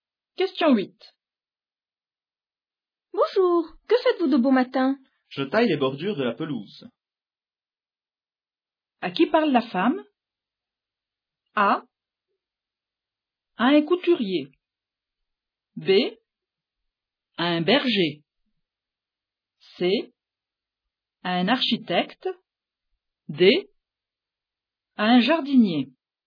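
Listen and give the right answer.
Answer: D: À un jardinier.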